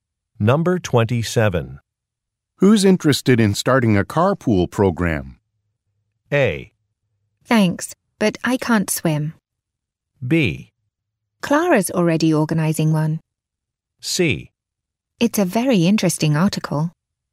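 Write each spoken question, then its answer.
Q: Who's interested in starting a carpool program?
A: B: Clara's already organizing one.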